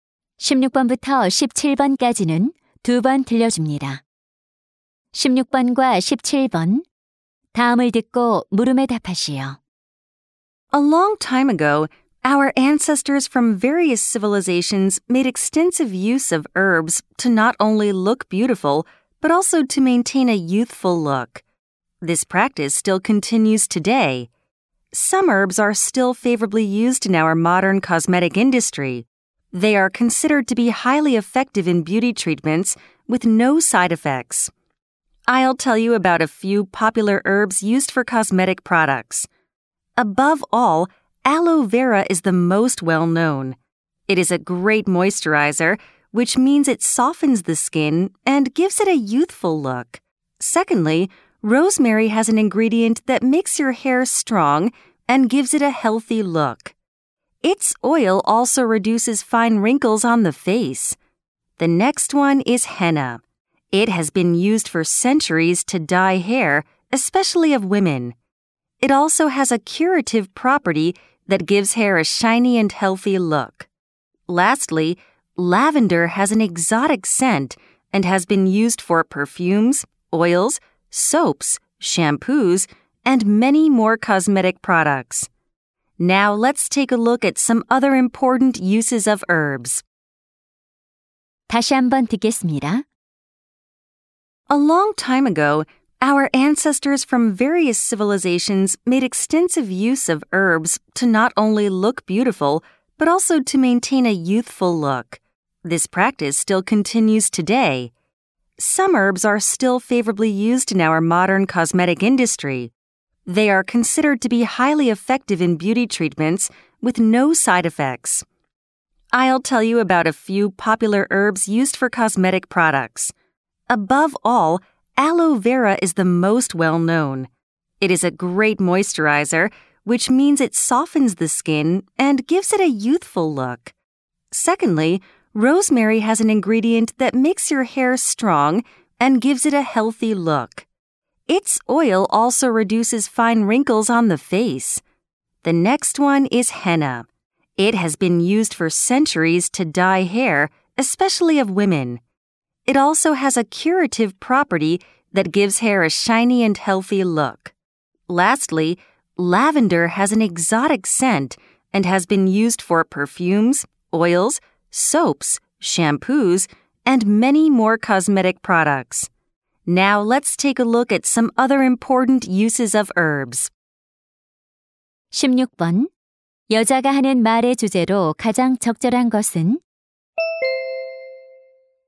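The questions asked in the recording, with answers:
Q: 여자가 하는 말의 주제로 가장 적절한 것은?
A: 화장품에 사용되는 허브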